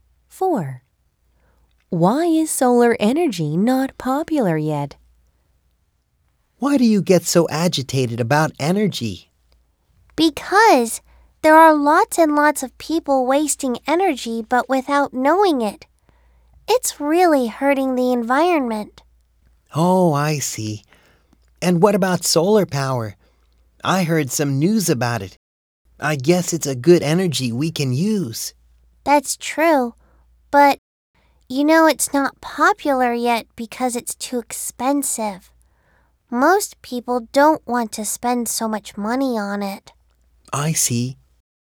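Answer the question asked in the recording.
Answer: Because it is too expensive.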